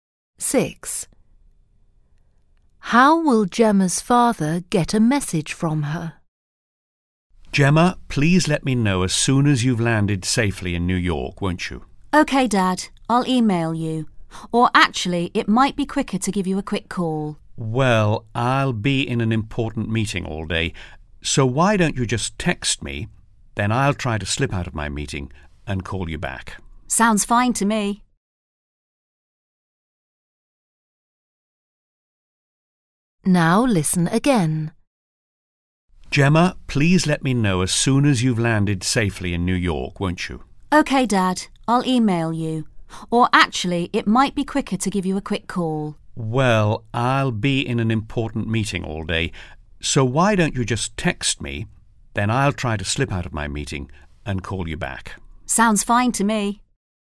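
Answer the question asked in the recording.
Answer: By text message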